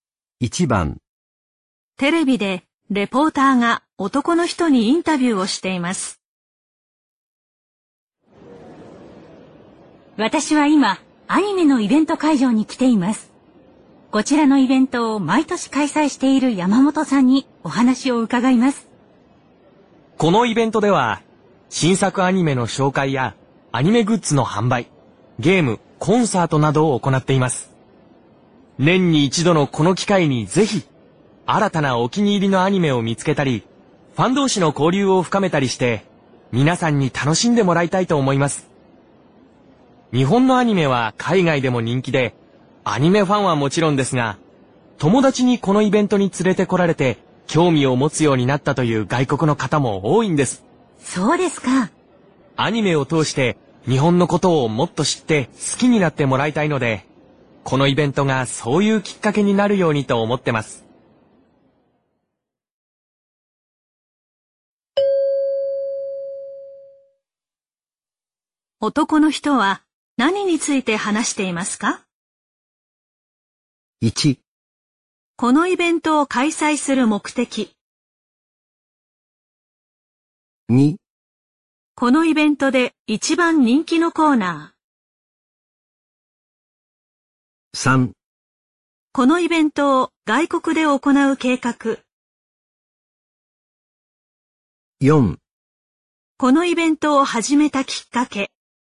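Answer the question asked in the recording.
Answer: 1: このイベントを開催する目的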